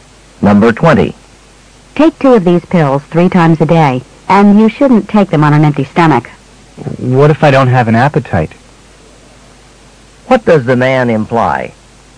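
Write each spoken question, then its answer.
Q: What does the man imply?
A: He might not feel like eating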